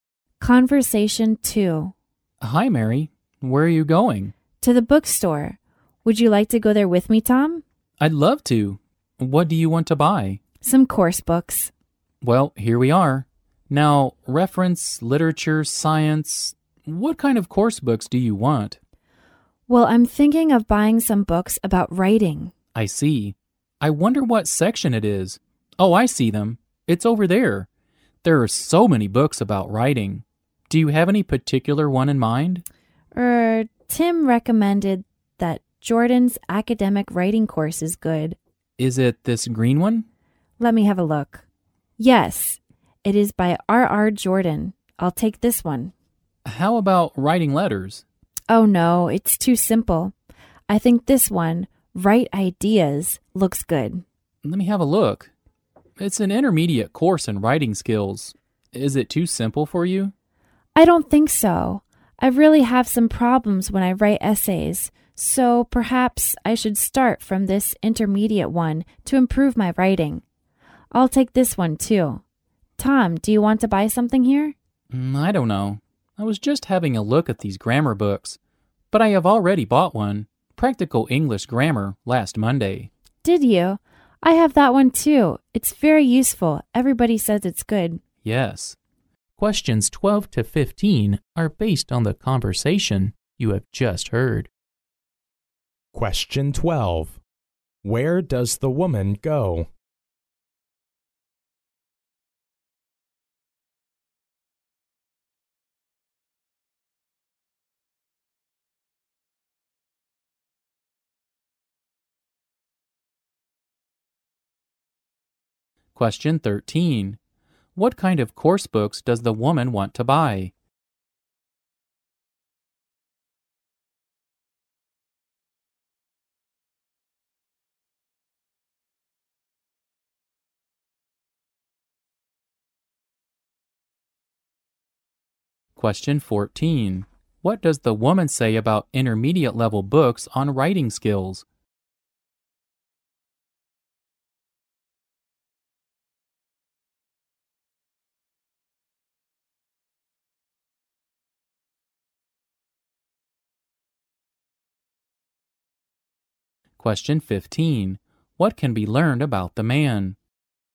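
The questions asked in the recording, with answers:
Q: Where does the woman go?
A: To the bookstore

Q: What kind of course books does the woman want to buy?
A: Books about writing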